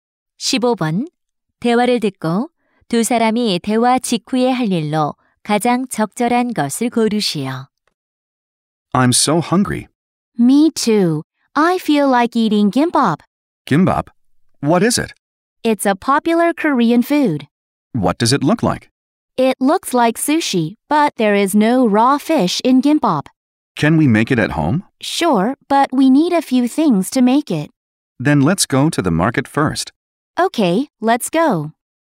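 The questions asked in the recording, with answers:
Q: 대화를 듣고 두 사람이 대화 직후에 할 일로 가장 적절한 것을 고르시오.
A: 시장에 가기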